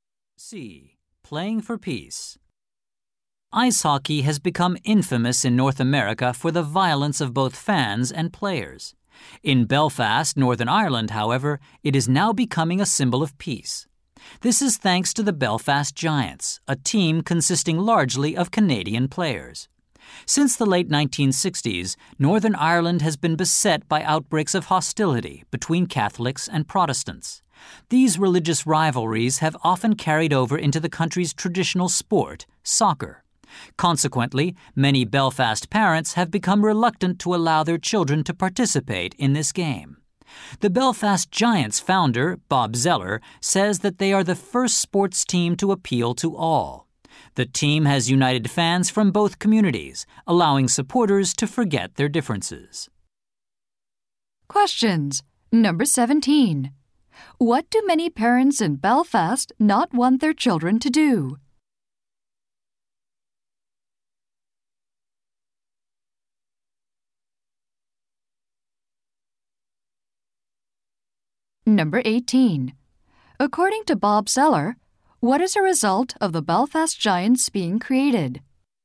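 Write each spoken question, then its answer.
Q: What do many parents in Belfast not want their children to do?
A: Play soccer

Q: According to Bob Zeller, what is a result of the Belfast Giants being created?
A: Fans from both religious communities have been united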